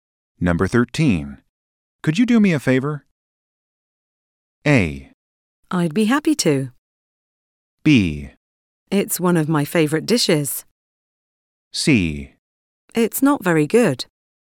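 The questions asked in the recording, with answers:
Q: Could you do me a favor?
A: A: I'd be happy to.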